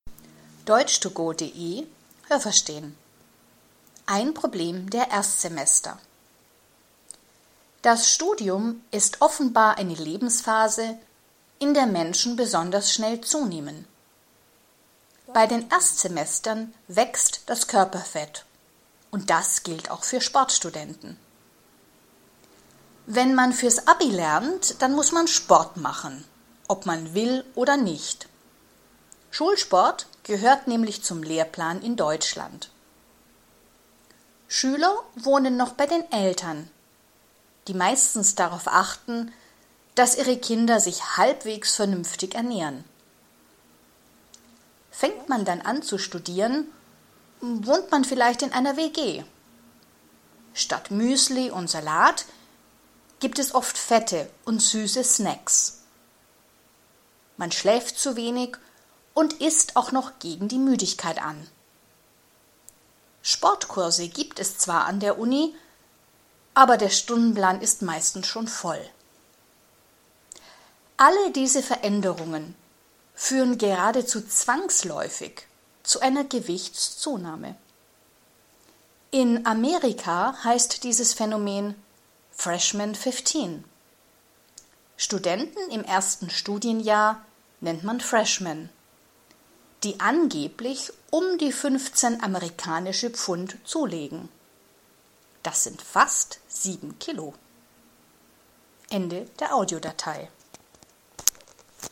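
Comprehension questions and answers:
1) Alle Erstsemester – außer Sportstudenten – nehmen zu.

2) In der Schule müssen alle Schüler nur Sport machen, wenn sie das wollen.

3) Wenn Jugendliche noch zu Hause wohnen, kümmern sich die Eltern meistens um gesunde Ernährung.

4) Wenn Jugendliche anfangen zu studieren, wohnen sie vielleicht in einer WG und ernähren sich oft ungesund.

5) An der Uni werden leider keine Sportkurse angeboten.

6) Weniger Sport und ungesundes Essen machen Studenten automatisch dick.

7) Amerikanische Erstsemester nehmen fast 15 Kilo zu.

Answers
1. Falsch
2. Falsch
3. Richtig
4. Richtig
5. Falsch
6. Richtig
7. Falsch

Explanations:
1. Auch Sportstudenten nehmen an Gewicht zu.
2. Alle Schüler müssen Sport machen, weil das im Lehrplan steht.
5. Es gibt Sportkurse, aber sie passen meistens nicht in den Stundenplan.
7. Sie nehmen 15 amerikanische Pfund zu, das sind fast 7 Kilo.

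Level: Hörtexte B (mittel)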